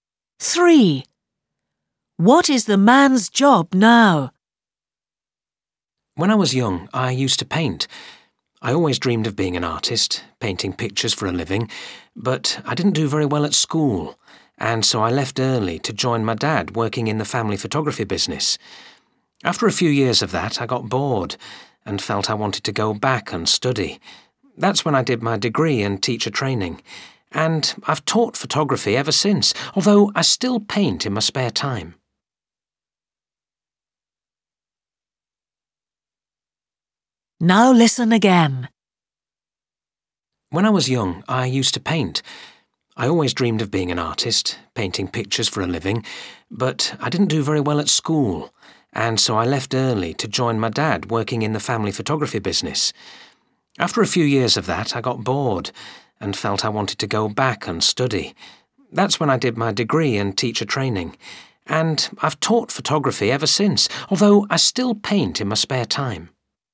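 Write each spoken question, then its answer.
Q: What is the man's job now?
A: Photography teacher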